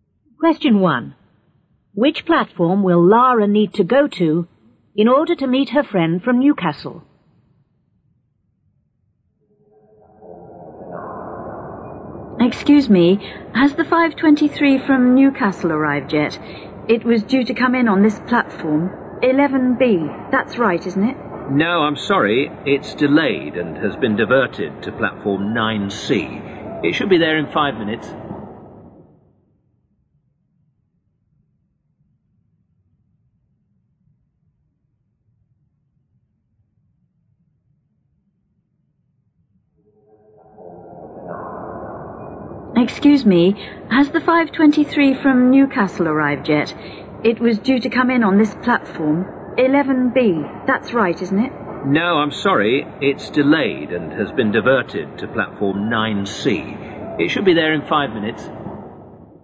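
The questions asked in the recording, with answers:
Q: Which platform will Lara need to go to in order to meet her friend from Newcastle?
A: Platform 9C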